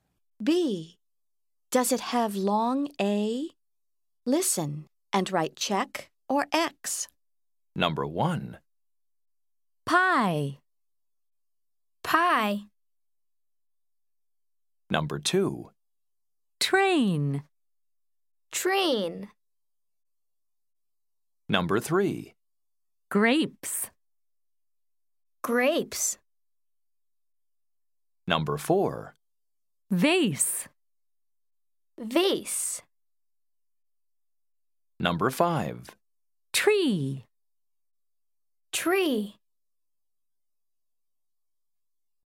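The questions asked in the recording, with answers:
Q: Train.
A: check (long A)

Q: Grapes.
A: check (long A)

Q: Vase.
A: check (long A)

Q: Tree.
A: X (no long A)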